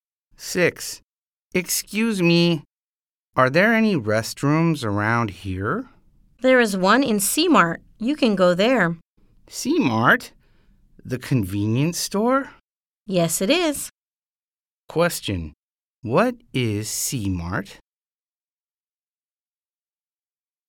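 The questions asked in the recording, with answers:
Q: Question: What is C Mart?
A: A convenience store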